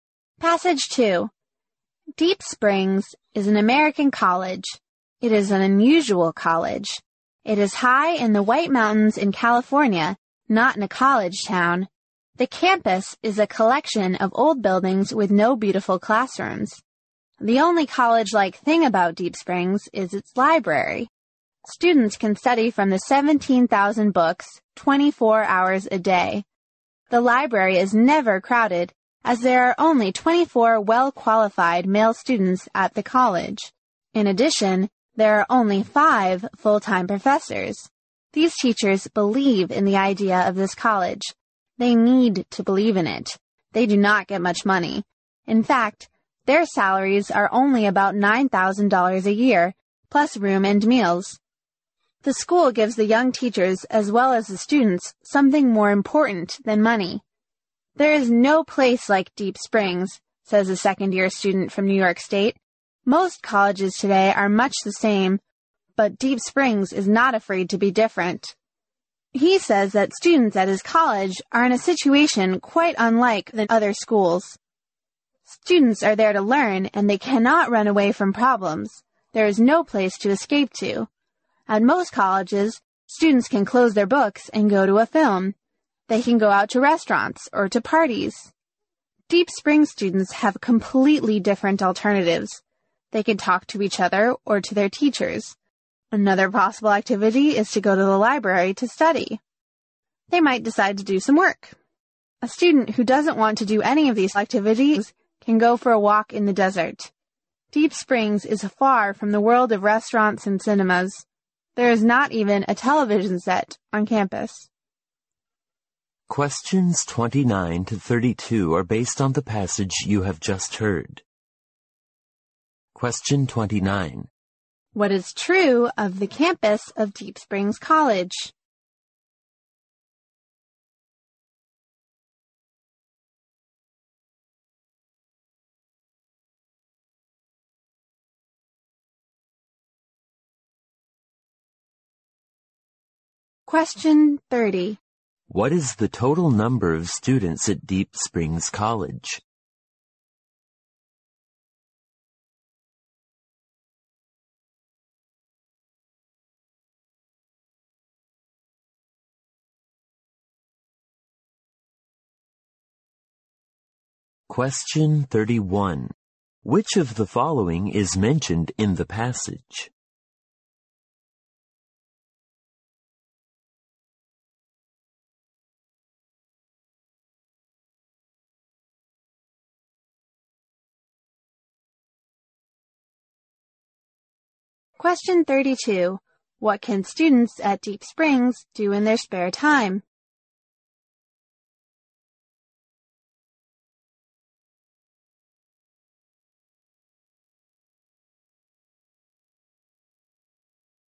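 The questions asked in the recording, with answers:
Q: What is true of the campus of Deep Springs College?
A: It is a collection of old buildings with no beautiful classrooms.

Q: What is the total number of students at Deep Springs College?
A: 24

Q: What can students at Deep Springs do in their spare time?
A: Talk with each other or teachers, study in the library, work, or walk in the desert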